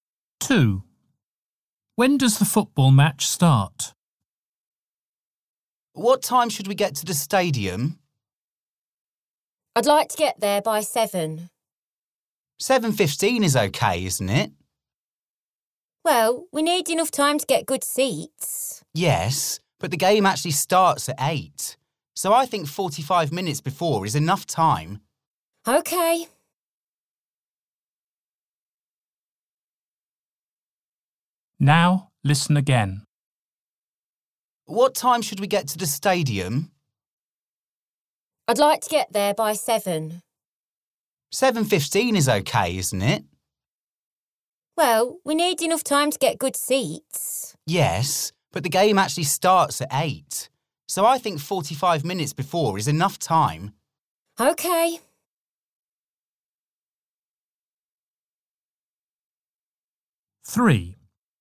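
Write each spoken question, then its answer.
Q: When does the football match start?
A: At 8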